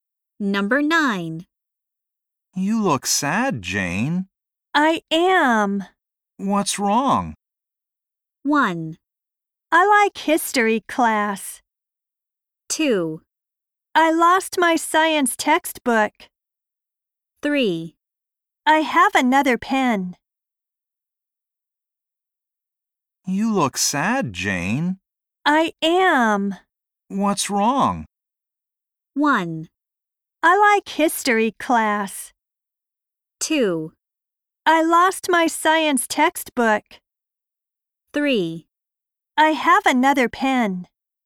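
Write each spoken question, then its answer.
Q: What's wrong?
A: 2: I lost my science textbook.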